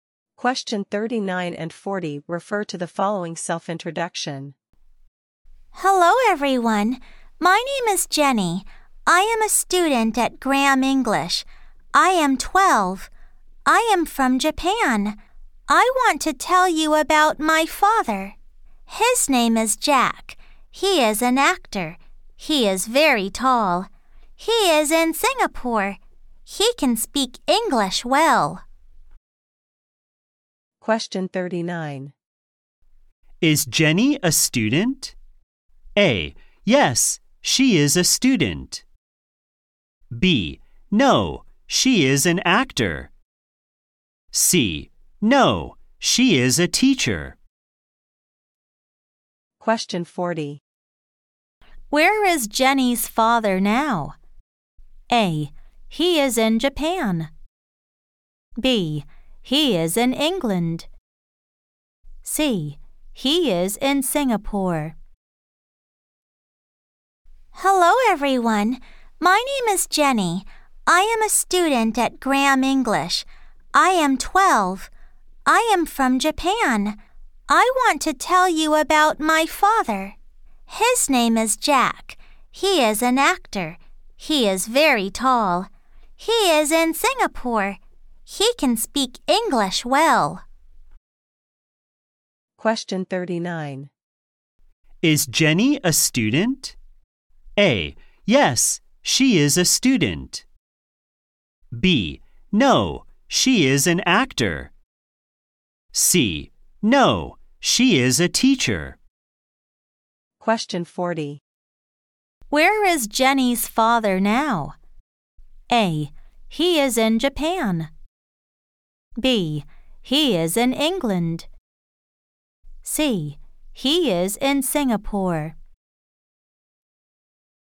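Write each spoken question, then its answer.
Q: Is Jenny a student?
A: A: Yes, she is a student.

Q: Where is Jenny's father now?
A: C: He is in Singapore.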